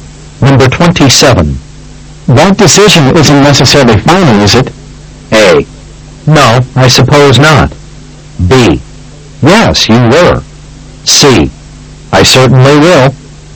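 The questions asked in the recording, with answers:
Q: That decision isn't necessarily final, is it?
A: A: No, I suppose not.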